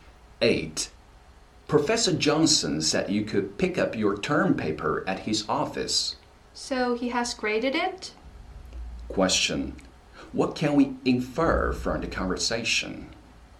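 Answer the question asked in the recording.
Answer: The professor has graded the term paper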